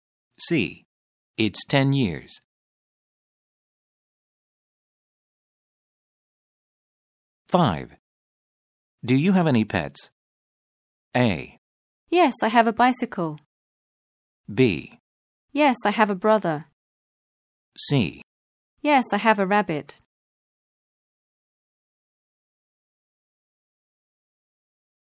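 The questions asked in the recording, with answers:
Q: Do you have any pets?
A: C: Yes, I have a rabbit.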